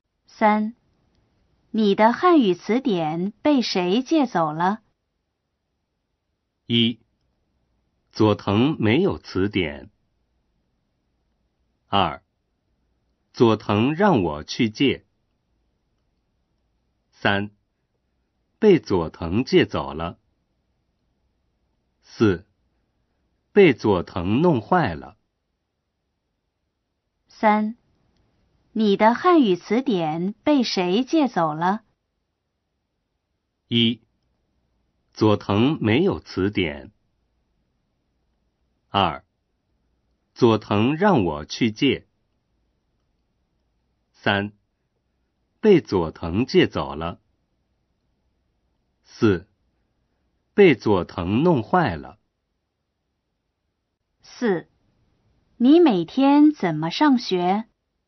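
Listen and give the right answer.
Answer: 三: 被佐藤借走了。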